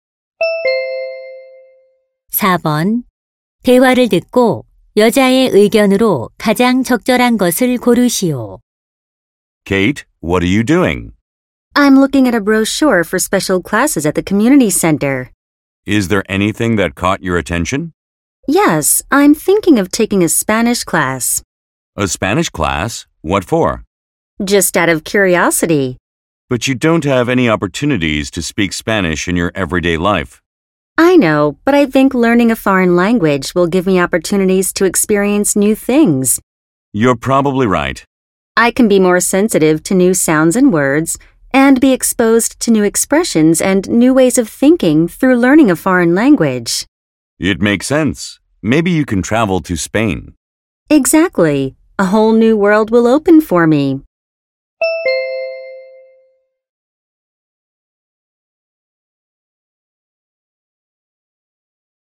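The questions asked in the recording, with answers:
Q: 대화를 듣고 여자의 의견으로 가장 적절한 것을 고르시오.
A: 외국어 학습은 새로운 것을 경험할 기회를 준다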